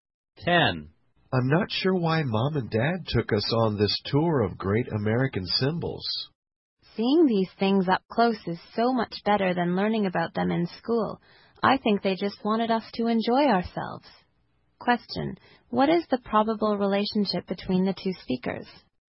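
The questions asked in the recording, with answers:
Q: What is the probable relationship between the two speakers?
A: Brother and sister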